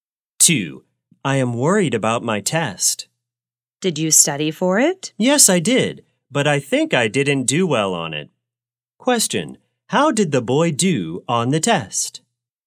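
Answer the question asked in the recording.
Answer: He thinks he didn't do well.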